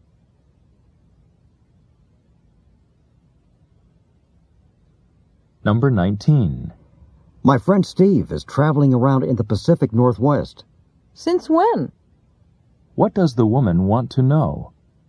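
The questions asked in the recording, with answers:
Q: What does the woman want to know?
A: When Steve started traveling.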